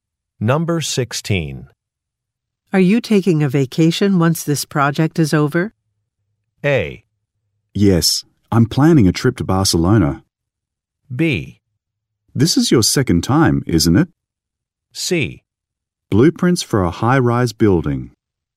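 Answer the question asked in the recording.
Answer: A: Yes, I'm planning a trip to Barcelona.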